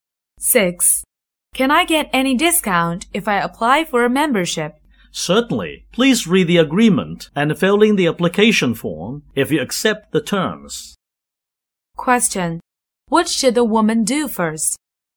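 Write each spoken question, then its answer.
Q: What should the woman do first?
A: Read the agreement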